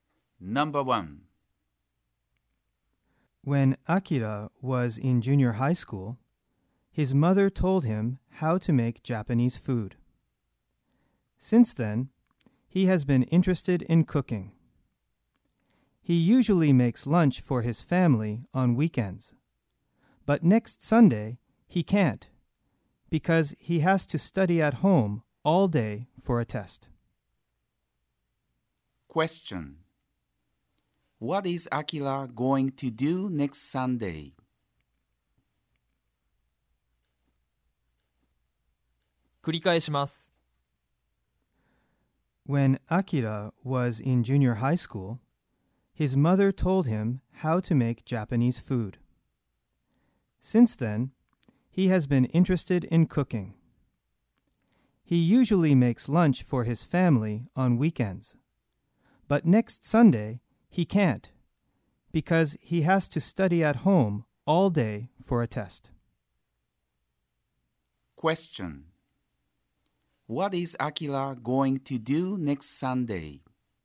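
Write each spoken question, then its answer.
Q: What is Akira going to do next Sunday?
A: He is going to study at home all day for a test.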